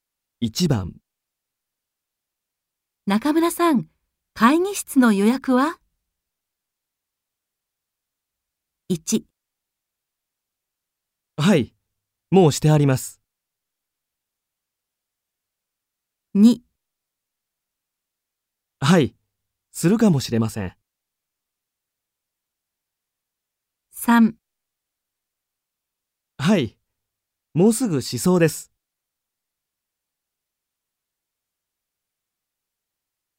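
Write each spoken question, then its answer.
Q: 中村さん、会議室の予約は?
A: 1: はい、もうしてあります。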